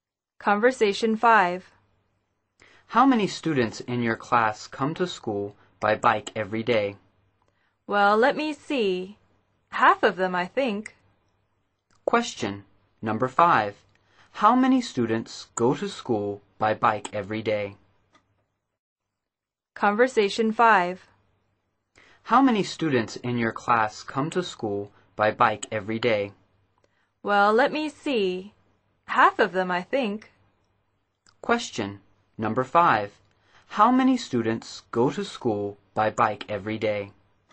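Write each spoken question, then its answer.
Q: How many students go to school by bike every day?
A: Half of them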